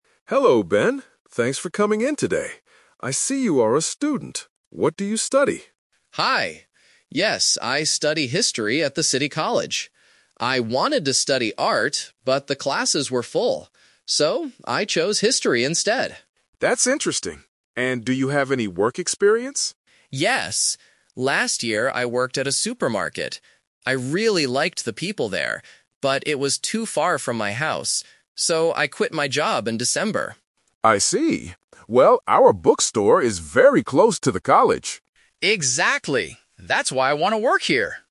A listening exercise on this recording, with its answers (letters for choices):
Listen to a store manager interviewing a student for a part-time job. For each question, choose the correct answer (A, B, or C).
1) What does Ben study at college?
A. Art.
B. History.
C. Business.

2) Where did Ben work last year?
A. At a supermarket.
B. At a bookstore.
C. At a restaurant.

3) Why did Ben leave his old job?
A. He didn't like the people there.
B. The job was too far from his house.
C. He wanted more time to study.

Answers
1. B
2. A
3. B

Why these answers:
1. Ben clearly says, "I study history at the city college." Why the traps are wrong: Option A is a "Twist Trap". Ben wanted to study art, but the classes were full, so he couldn't. Option C is not mentioned.
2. When asked about work experience, Ben says, "Last year, I worked at a supermarket." Why the traps are wrong: Option B is the trap because the bookstore is where he is interviewing right now, not where he worked in the past. Option C is not mentioned.
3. Ben explains his reason for quitting: "...but it was too far from my house." Why the traps are wrong: Option A is a trap. He actually says the opposite: "I really liked the people there." Option C is a plausible reason for a student to quit a job, but it is not the reason he gives in the audio.

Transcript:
Manager: Hello, Ben. Thanks for coming in today. I see you are a student. What do you study?
Ben: Hi! Yes, I study history at the city college. I wanted to study art, but the classes were full. So, I chose history instead.
Manager: That's interesting. And do you have any work experience?
Ben: Yes. Last year, I worked at a supermarket. I really liked the people there, but it was too far from my house. So, I quit my job in December.
Manager: I see. Well, our bookstore is very close to the college.
Ben: Exactly! That's why I want to work here.